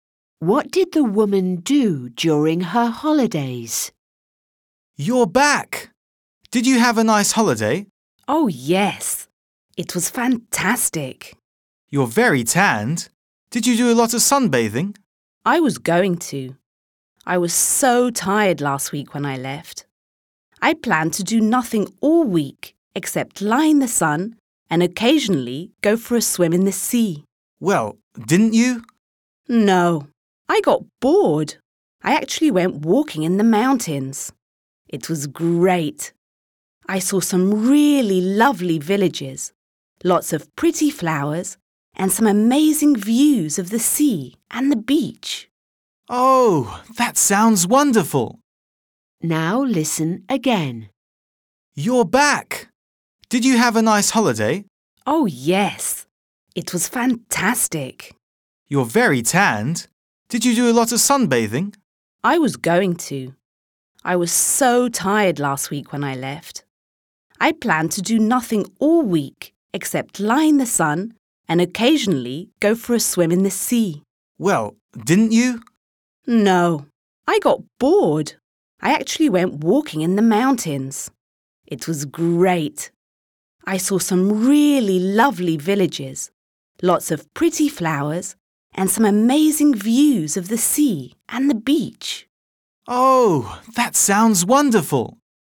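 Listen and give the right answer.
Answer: She went walking in the mountains.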